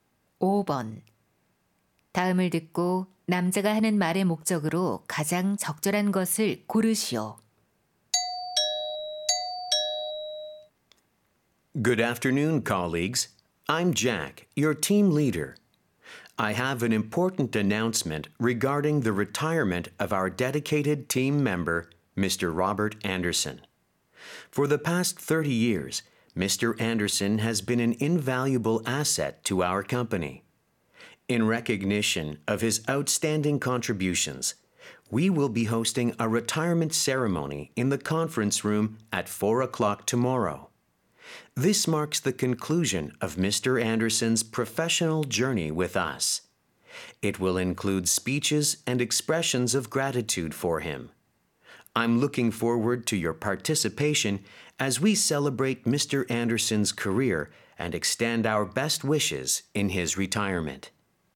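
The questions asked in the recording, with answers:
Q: 다음을 듣고 남자가 하는 말의 목적으로 가장 적절한 것을 고르시오.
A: 동료의 은퇴식 개최를 알리고 참석을 요청하려고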